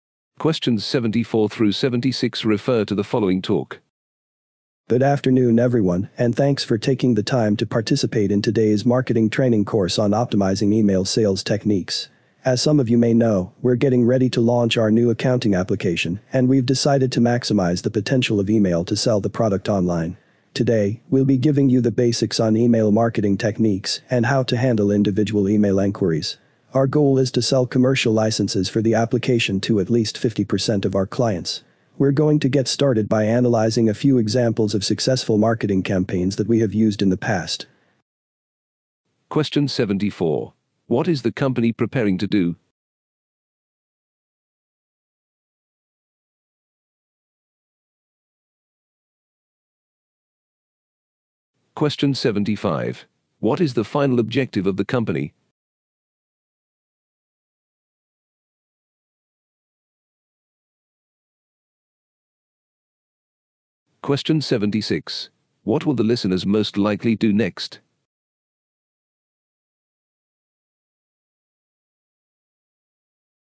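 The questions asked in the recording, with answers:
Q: What is the company preparing to do?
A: Launch a new accounting application

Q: What is the final objective of the company?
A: To sell commercial licenses to at least 50% of its clients

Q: What will the listeners most likely do next?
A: Analyze examples of successful past marketing campaigns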